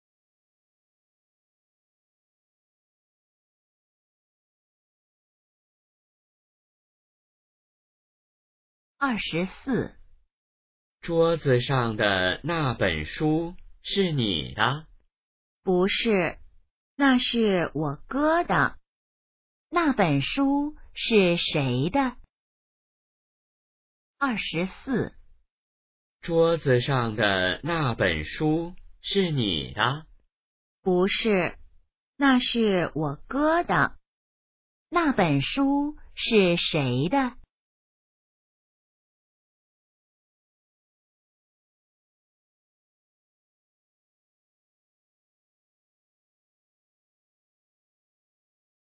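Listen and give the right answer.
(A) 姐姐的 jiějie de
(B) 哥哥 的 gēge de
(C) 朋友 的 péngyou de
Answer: (B) 哥哥 的 gēge de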